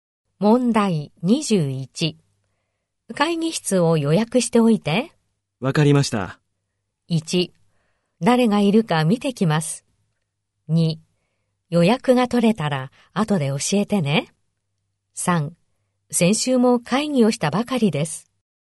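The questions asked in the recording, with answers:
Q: 会議室を予約しておいて。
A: 2: 予約が取れたら後で教えてね。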